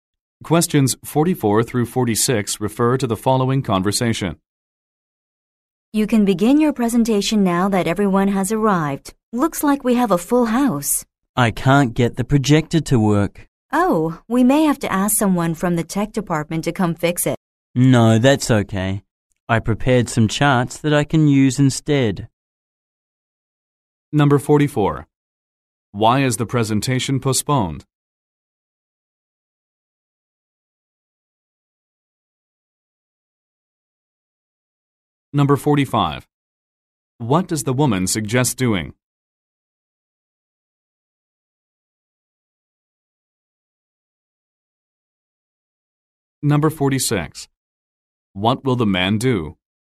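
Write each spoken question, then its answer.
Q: What does the woman suggest doing?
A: Asking someone from the tech department to fix the projector

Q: What will the man do?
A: Use the charts he prepared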